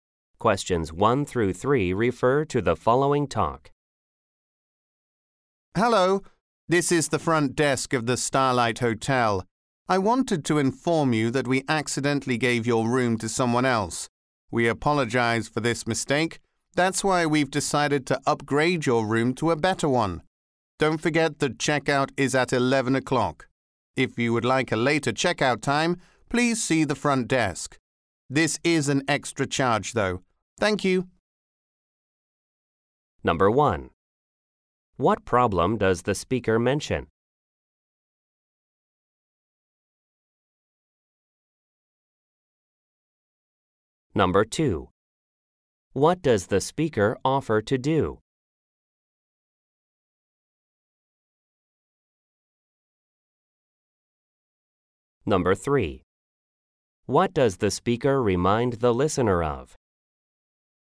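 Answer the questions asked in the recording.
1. The room was accidentally given to someone else
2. Upgrade the room
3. Checkout is at 11 o'clock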